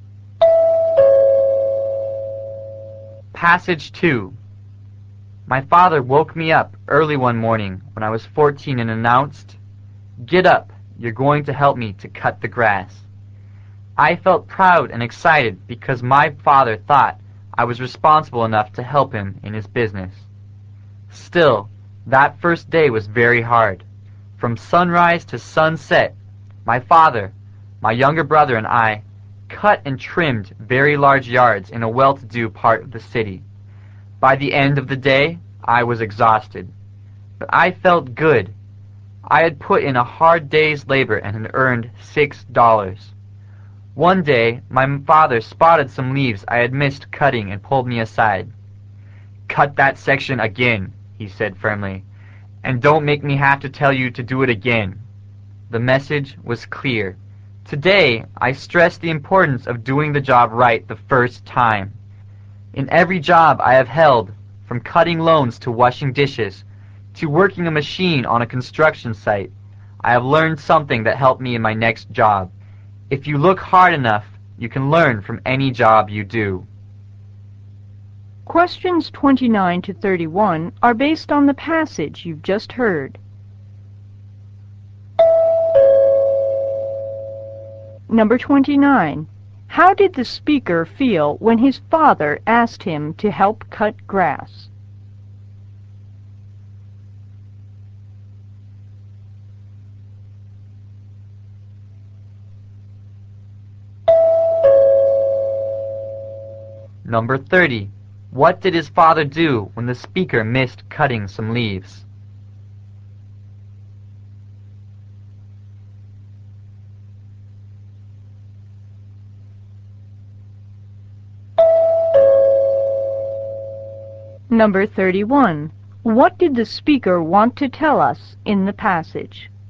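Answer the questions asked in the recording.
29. Proud and excited
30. He told him firmly to cut that section again
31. You can learn from any job you do; do it right the first time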